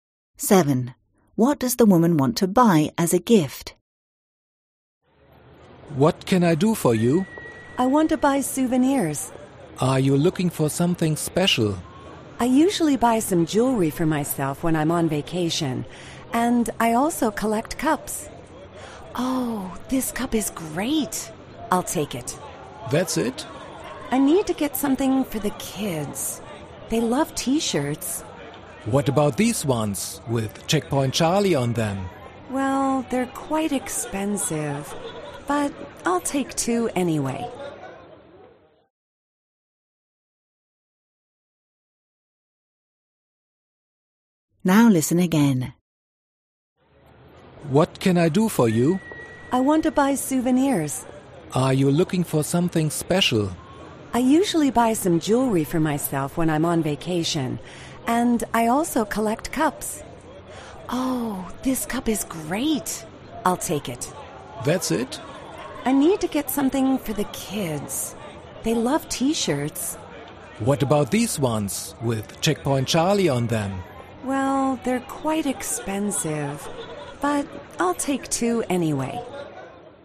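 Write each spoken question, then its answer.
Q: What does the woman want to buy as a gift?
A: T-shirts (with Checkpoint Charlie on them) for the kids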